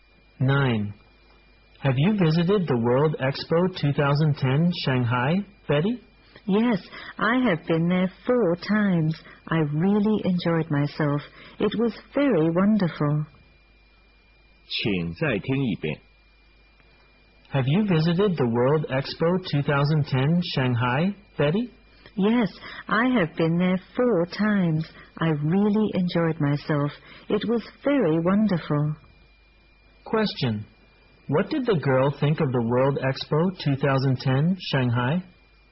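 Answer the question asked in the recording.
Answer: It was very wonderful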